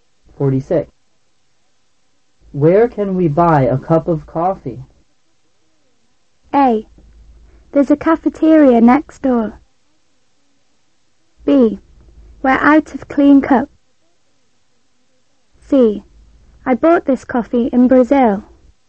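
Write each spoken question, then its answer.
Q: Where can we buy a cup of coffee?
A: A: There's a cafeteria next door.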